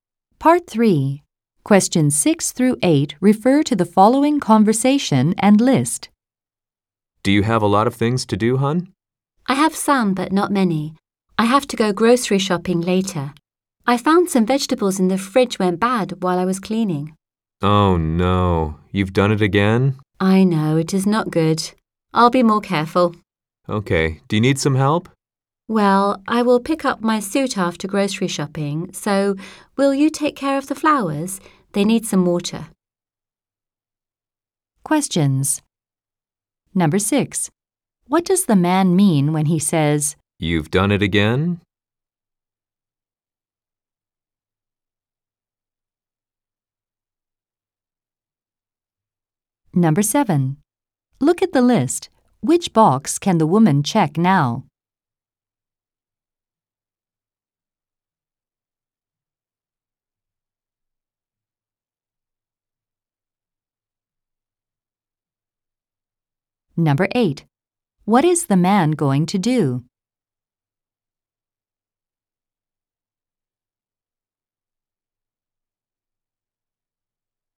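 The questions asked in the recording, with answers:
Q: What is the man going to do?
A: Water the flowers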